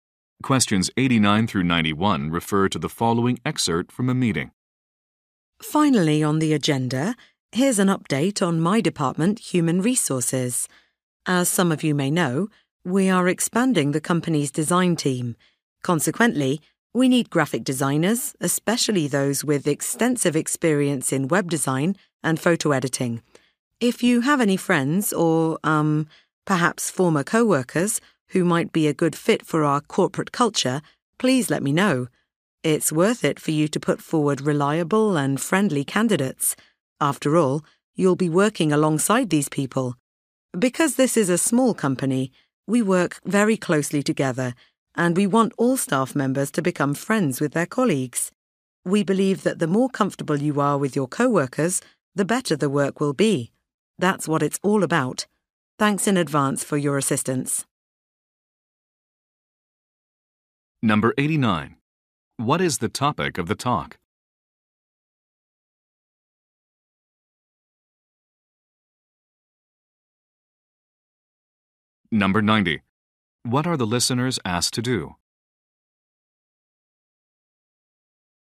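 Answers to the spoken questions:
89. Hiring graphic designers for the design team
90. Recommend suitable candidates they know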